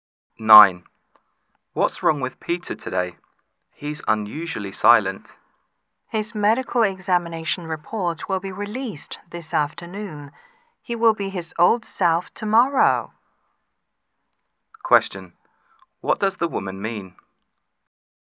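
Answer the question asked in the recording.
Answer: Peter is worried about his medical report and will be back to normal once he gets it.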